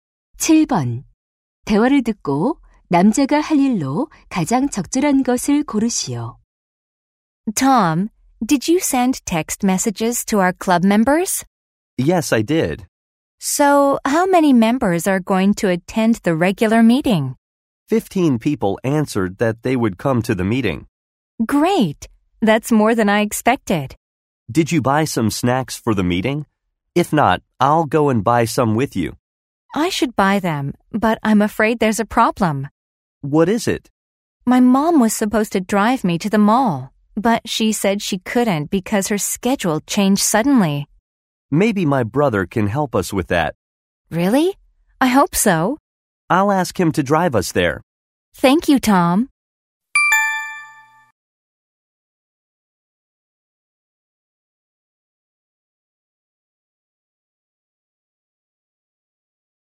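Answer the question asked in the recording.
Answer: 형에게 쇼핑몰까지 태워 달라고 부탁하기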